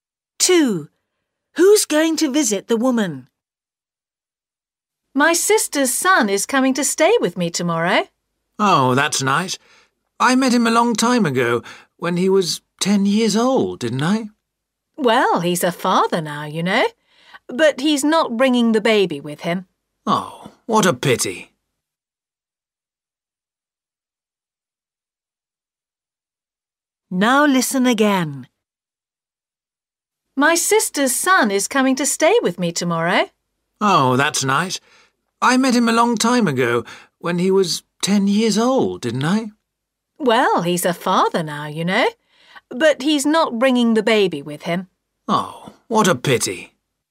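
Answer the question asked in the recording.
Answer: her sister's son (her nephew)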